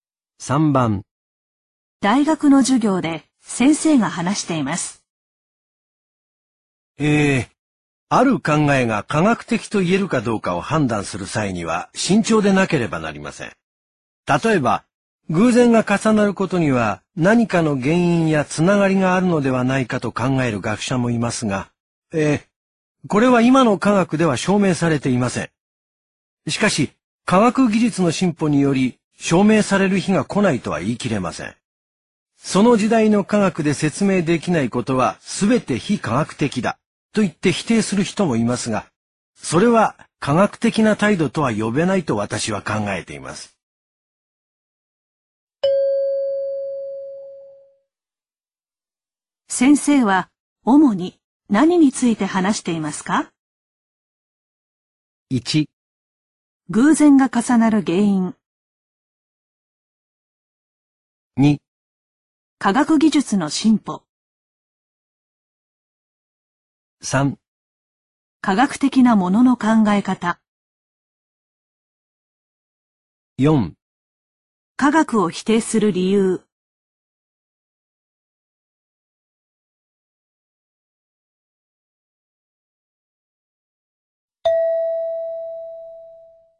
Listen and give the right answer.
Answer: 3

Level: N2